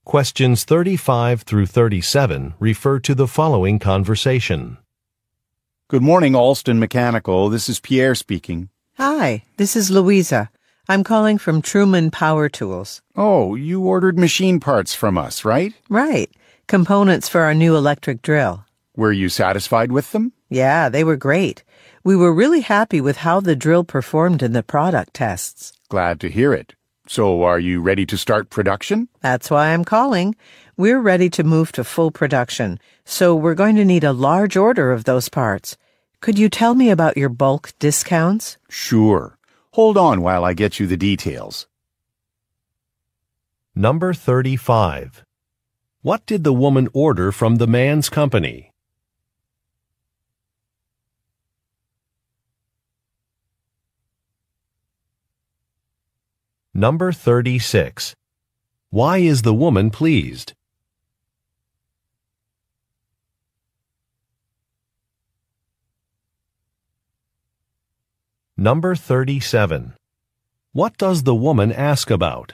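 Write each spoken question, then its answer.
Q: What did the woman order from the man's company?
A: Machine parts (components for an electric drill)

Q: Why is the woman pleased?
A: The drill performed well in product tests

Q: What does the woman ask about?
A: Bulk discounts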